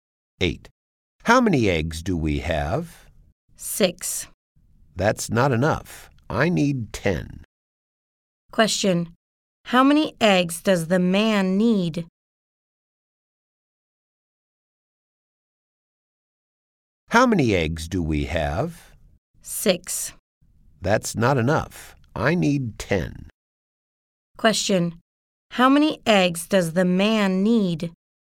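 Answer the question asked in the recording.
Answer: 10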